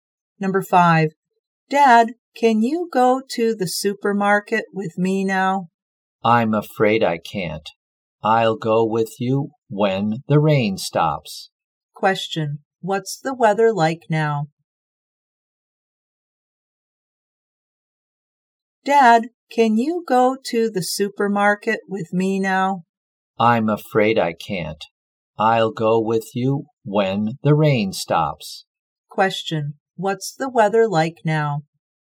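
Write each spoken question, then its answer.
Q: Question, what's the weather like now?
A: Rainy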